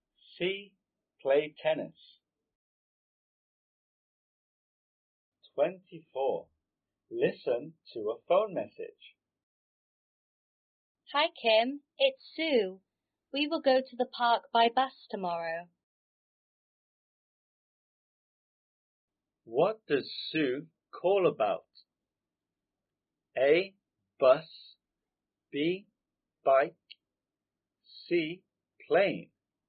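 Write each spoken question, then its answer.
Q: What does Sue call about?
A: A: Bus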